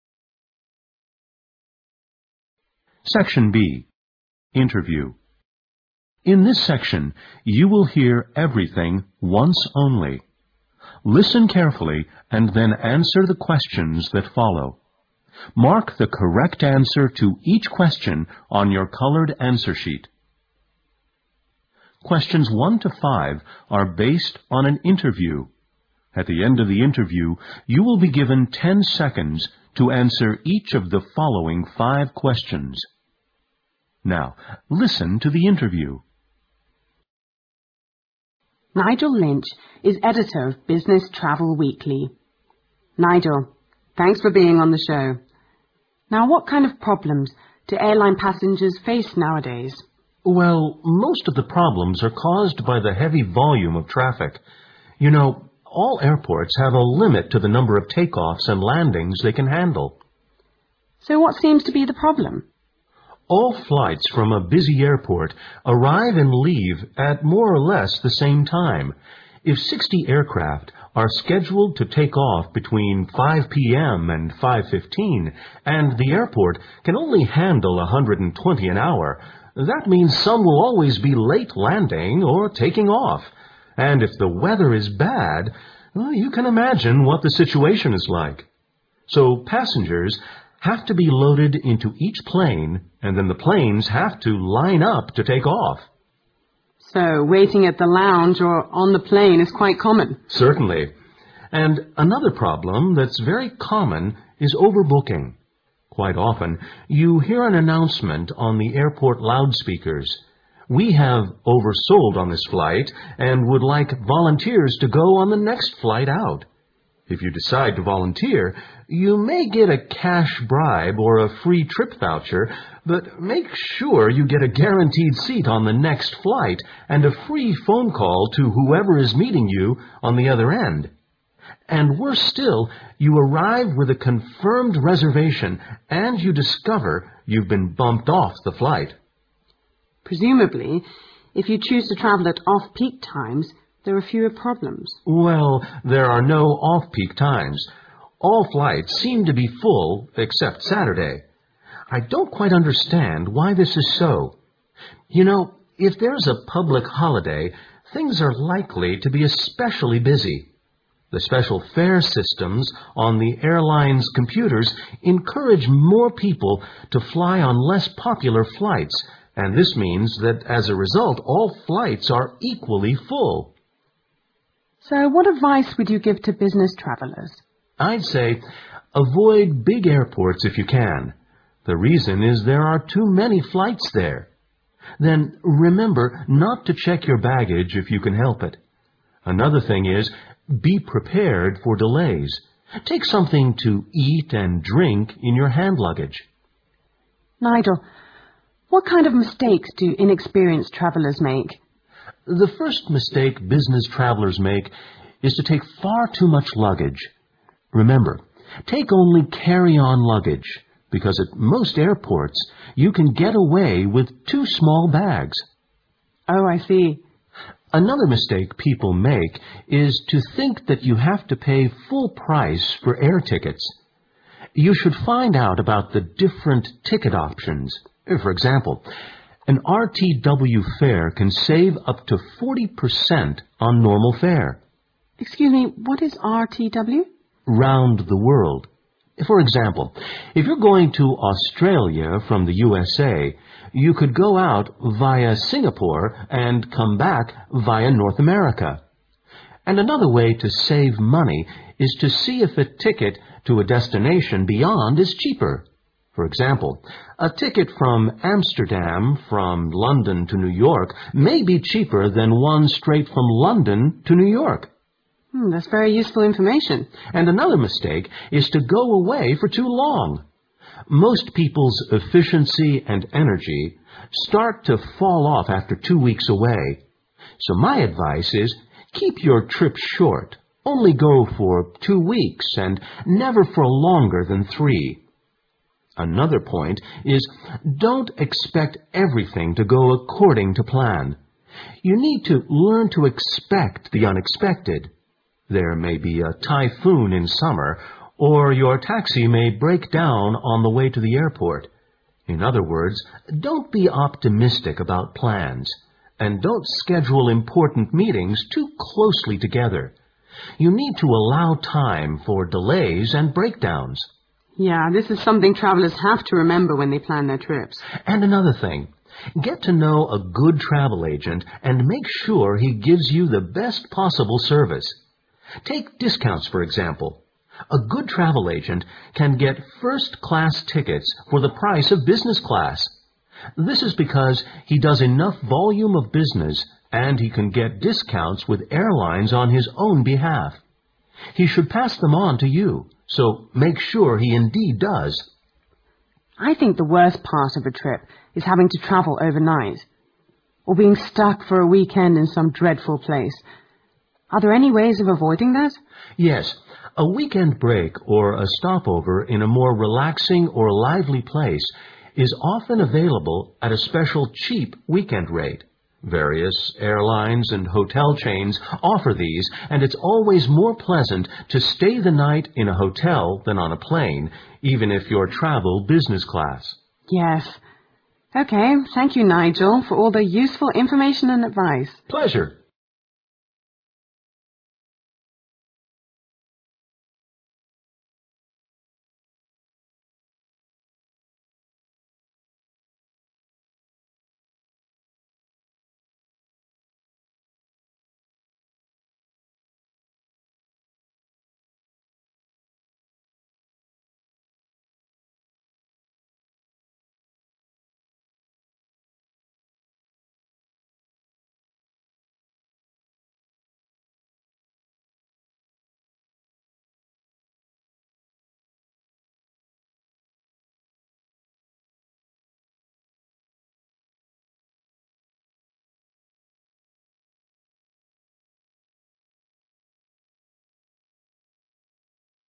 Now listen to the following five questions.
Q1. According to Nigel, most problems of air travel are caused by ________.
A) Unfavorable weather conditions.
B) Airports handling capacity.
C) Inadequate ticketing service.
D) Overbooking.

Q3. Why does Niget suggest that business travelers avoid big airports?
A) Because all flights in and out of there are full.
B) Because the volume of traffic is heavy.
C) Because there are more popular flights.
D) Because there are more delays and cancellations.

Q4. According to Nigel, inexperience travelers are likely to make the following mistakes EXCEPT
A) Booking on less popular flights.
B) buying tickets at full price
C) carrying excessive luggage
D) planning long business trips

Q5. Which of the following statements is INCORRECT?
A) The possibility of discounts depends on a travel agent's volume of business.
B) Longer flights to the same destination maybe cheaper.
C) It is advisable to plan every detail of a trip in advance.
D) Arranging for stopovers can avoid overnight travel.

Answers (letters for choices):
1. B
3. B
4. A
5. C

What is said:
SECTION B INTERVIEW
Interviewer: Nigel Lynch is editor of Business Travel Weekly. Nigel, thanks for being on the show. Now, what kind of problems do airline passengers face nowadays?
Nigel: Well, most of the problems are caused by the heavy volume of traffic. You know, all
airports have a limit to the number of takeoffs and landings they can handle. ( Q1) Interviewer: So what seems to be the problem?
Nigel: All flights from a busy airport arrive and leave at more or less the same time. If 60 air-
crafts are scheduled to take off between 5 p. m. and 5: 15 and the airport can only han?dle 120 an hour, that means some will always be late landing or takingoff. And if the weather is bad , you can imagine what the situation is like. So passengers have to be loaded into each plane and the planes have to line up to take off.
Interviewer: So, waiting at the lounge or on the plane is quite common.
Nigel: Certainly. And another problem that's very common is overbooking. Quite often, you
hear an announcement on the airport loudspeakers: "we have oversold on this flight and would like volunteers to go on the next flight out. If you decide to volunteer, you may get a cash bribe or a free trip , but make sure that you get a guaranteed seat on the next flight and a free phone call to whoever is meeting you on the other end. " ( Q2 ) And worse still, you arrive with a confirmed reservation and you discover you've been bumped off the flight.
Interviewer: Presumably, if you choose to travel at off-peak times, there are a few problems.
Nigel: Well, there are no off-peak times. All flights seem to be full except Saturday. I don't quite understand why this is so. You know, if there is a public holiday, things are like?ly to be especially busy. The special fare systems on the airlines' computers encourage more people to fly on less popular flights and this means, that, as a result, all flights are equally full.
Interviewer: So, what advice would you give to business travelers?
Nigel: I'd say, avoid big airports, if you can. The reason is that there are too many flights
there. ( Q3) Then, remember not to check your baggage if you can help it. Another thing is , be prepared for delays. Take something to eat and drink in your hand luggage. Interviewer: Nigel, what kind of mistakes do inexperienced travelers make?
Nigel: The first mistake business travelers make is to take far too much luggage.
member, take only carry-on luggage, because in most airports, you can get away with two small bags.
Interviewer: Oh, I see.
Nigel: Another mistake people make is to think that you have to pay full price for air tickets.
( Q4) You shoiild find out about the different ticket options. For example, an RTW fare can save up to 40% on normal fare.
Interviewer: Excuse me, what is RTW?
Nigel: Round The World. For example, if you're going to Australia from the USA, you could
go out via Singapore , and come back via North America. And another way to save mon?ey is to see if a ticket to a destination beyond is cheaper. For example, a ticket from Amsterdam, from London to New York may be cheaper than one straight from London to New York.
Interviewer: Urn, that's very useful information.
Nigel: And another mistake is to go away for too long. ( Q4) Most people's efficiency and ener
gy start to fall off after two weeks away. So my advice is to keep your trip short, only go for two weeks and never for a longer than three. Another point is, don't expect every?thing to go according to plan. You need to learn to expect the unexpected. ( Q5) There may be a typhoon in summer, or your taxi may break down on the way to the airport. In other words, don't be optimistic about plans and don't schedule important meetings too closely together. You need to allow time for delays and breakdowns.
Interviewer: Yeah, this is something travelers have to remember when they plan their trips.
Nigel: And another thing, get to know a good travel agent and make sure he gives you the best possible service. Take discounts for example, a good travel agent can get first-class tickets for the price of business class. This is because he does enough volume of busi?ness and he can get discounts with airlines on his own behalf. He should pass them on to you. So make sure he indeed does.
Interviewer I think the worst part of a trip is having to travel overnight , or being stuck for a weekend in some dreadful place. Are there any ways of avoiding that?
Nigel: Yes. A weekend break or a stopover in a more relaxing or a lively place is often availa
ble at a special cheap weekend rate. Various airlines and hotel chains offer these and it's always more pleasant to stay the night in a hotel than on a plane even if you travel business class.
Interviewer: Yes. OK, thank you, Nigel, for all this useful information and advice.